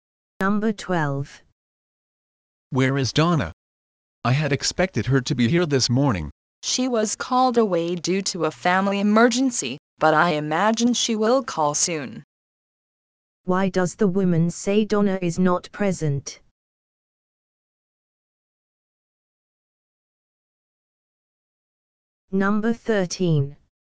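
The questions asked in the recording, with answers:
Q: Why does the woman say Donna is not present?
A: She was called away by a family emergency.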